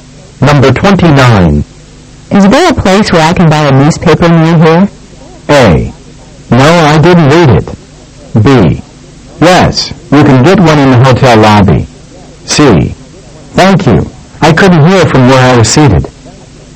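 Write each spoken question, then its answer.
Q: Is there a place where I can buy a newspaper near here?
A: B: Yes, you can get one in the hotel lobby.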